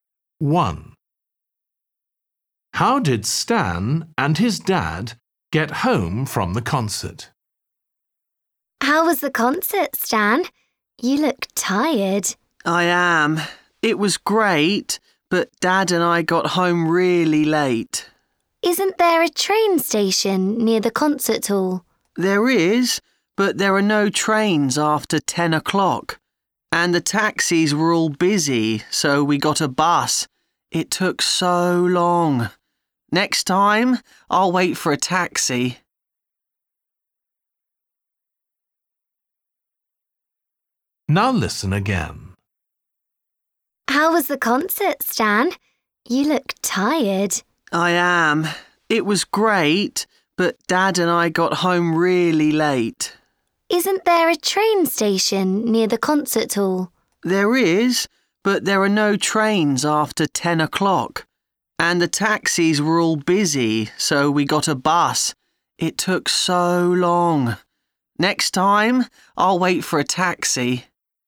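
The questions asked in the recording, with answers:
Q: How did Stan and his dad get home from the concert?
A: by bus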